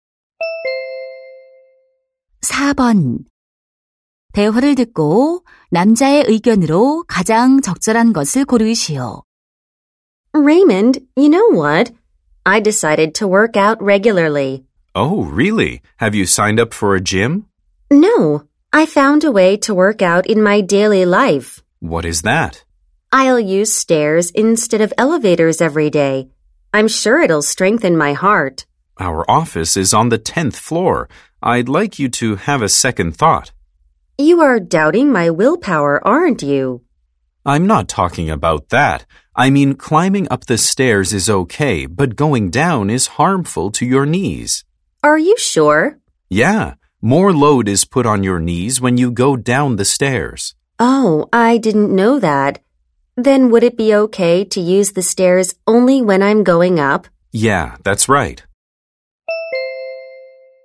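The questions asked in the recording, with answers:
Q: 대화를 듣고 남자의 의견으로 가장 적절한 것을 고르시오.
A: 계단을 내려가는 것은 무릎에 해로우므로 올라갈 때만 계단을 이용하는 것이 좋다.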